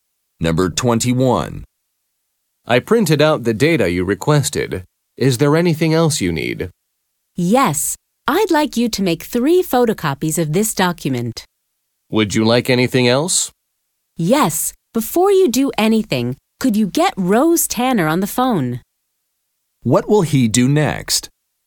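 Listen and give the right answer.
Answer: Get Rose Tanner on the phone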